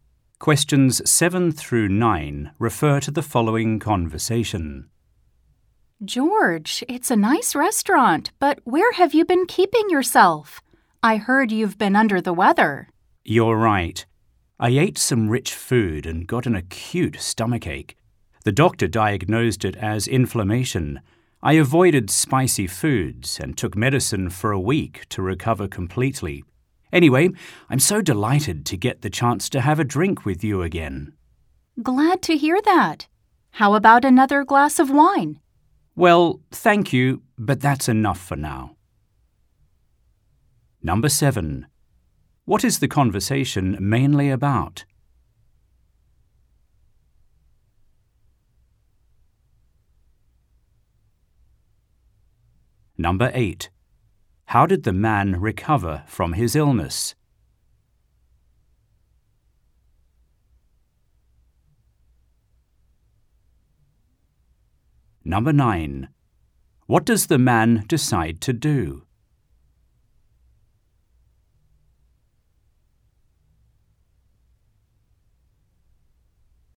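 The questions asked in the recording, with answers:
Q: How did the man recover from his illness?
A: He avoided spicy foods and took medicine for a week

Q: What does the man decide to do?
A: Not to have another glass of wine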